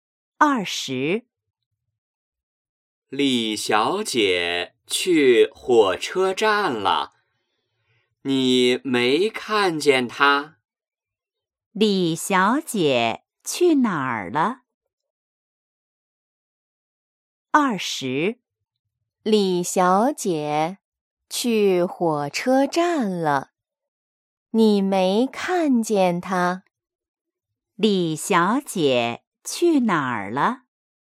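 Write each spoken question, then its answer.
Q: 李小姐去哪儿了?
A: 火车站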